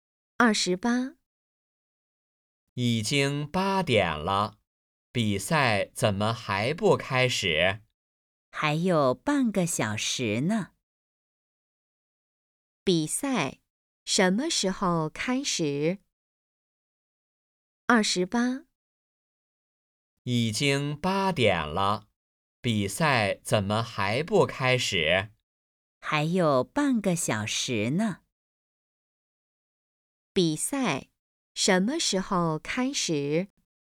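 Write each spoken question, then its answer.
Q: 比赛什么时候开始?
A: 8点半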